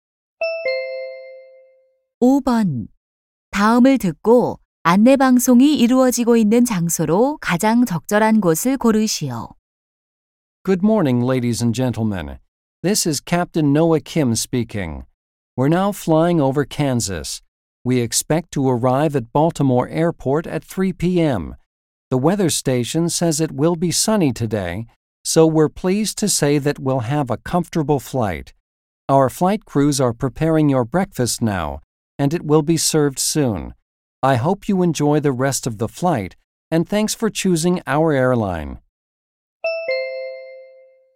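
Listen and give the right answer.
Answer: 비행기 안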